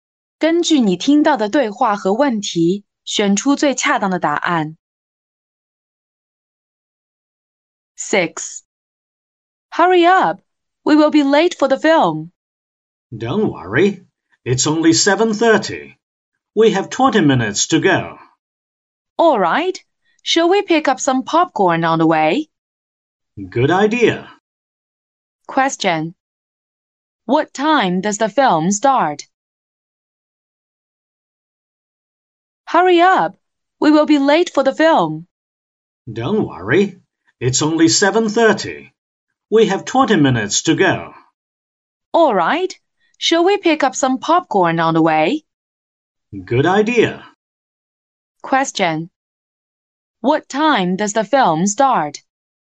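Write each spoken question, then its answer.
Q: What time does the film start?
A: At 7:50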